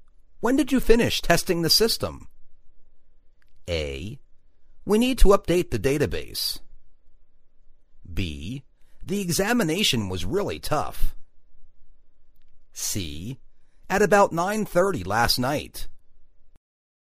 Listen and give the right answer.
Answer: At about nine-thirty last night.